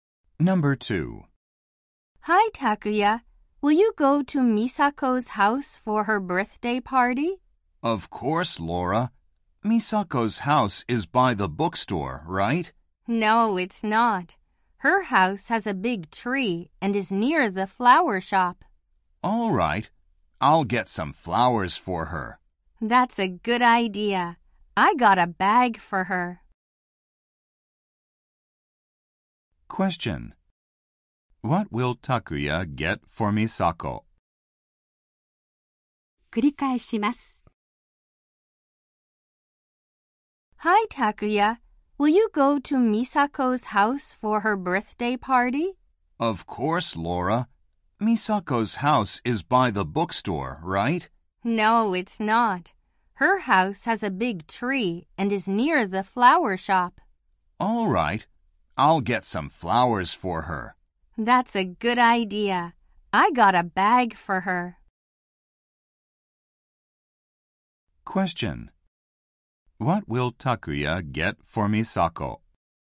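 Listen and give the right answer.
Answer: Some flowers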